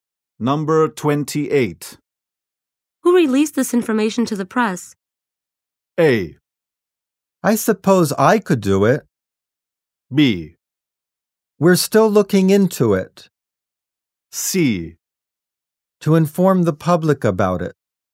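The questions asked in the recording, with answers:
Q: Who released this information to the press?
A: B: We're still looking into it.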